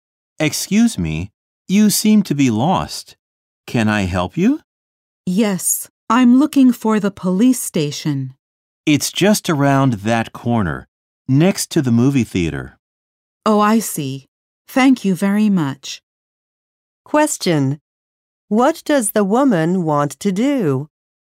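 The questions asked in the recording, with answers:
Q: What does the woman want to do?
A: Find the police station.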